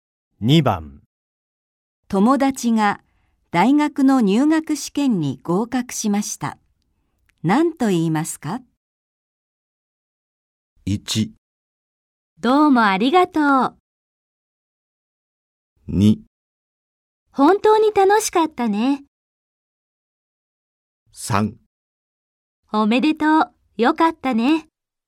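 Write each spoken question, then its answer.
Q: 友達が大学の入学試験に合格しました。何と言いますか?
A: 3: おめでとう。よかったね。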